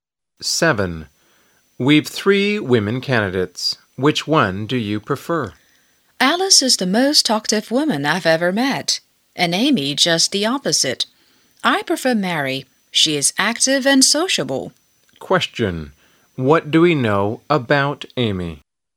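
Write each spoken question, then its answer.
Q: What do we know about Amy?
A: She is very quiet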